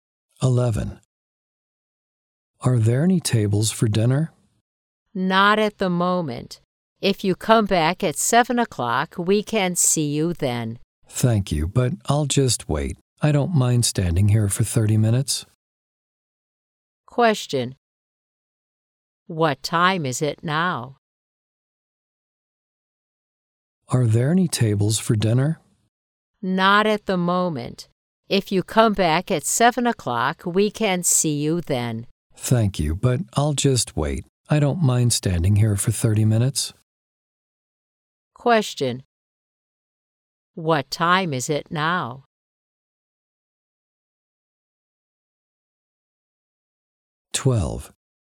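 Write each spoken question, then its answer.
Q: What time is it now?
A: 6:30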